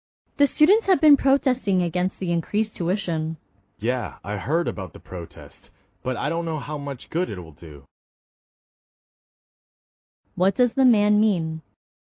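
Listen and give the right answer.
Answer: He doubts the protest will do much good.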